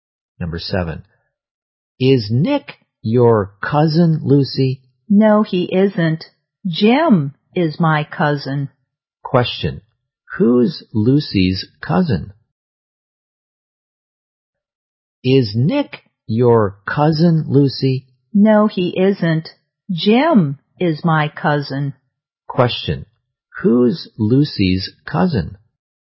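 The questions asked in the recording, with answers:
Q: who's Lucy's cousin?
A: Jim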